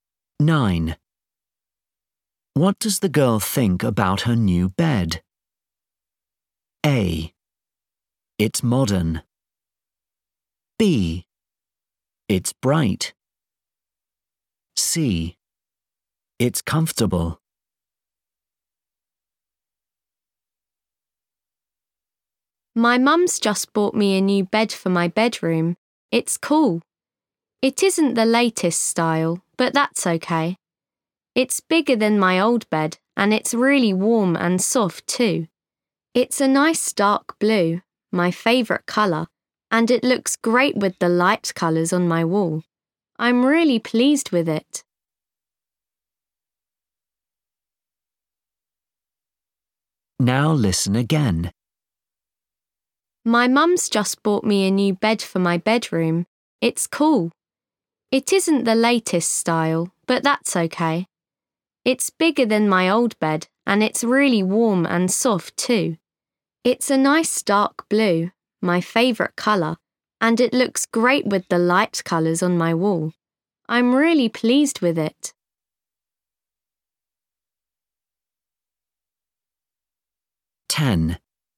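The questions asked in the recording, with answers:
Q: What does the girl think about her new bed?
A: C: It's comfortable.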